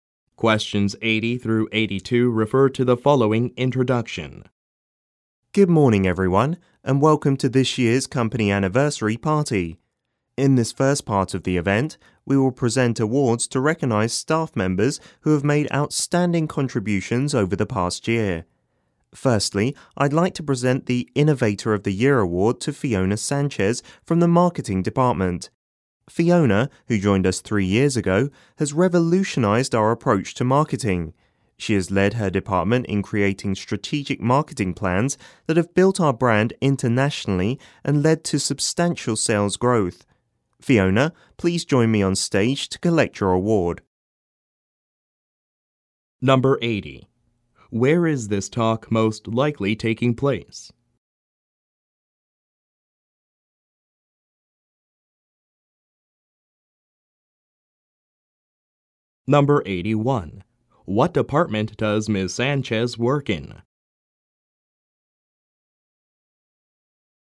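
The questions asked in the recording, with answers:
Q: Where is this talk most likely taking place?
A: At a company anniversary party

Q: What department does Ms. Sanchez work in?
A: Marketing

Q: Why is Ms. Sanchez being recognized?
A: Her marketing plans built the brand internationally and increased sales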